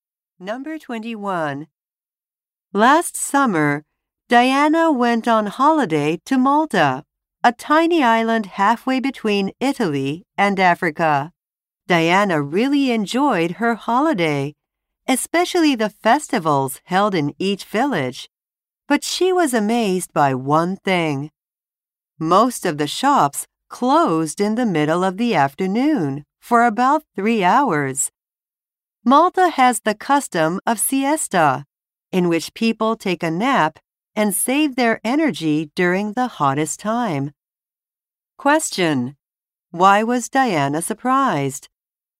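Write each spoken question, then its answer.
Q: Why was Diana surprised?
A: Most shops closed for about 3 hours in the middle of the afternoon.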